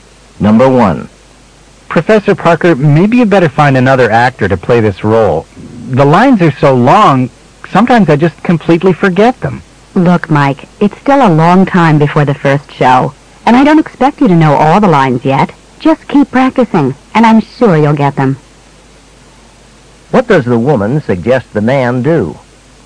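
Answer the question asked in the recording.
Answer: Keep practicing his lines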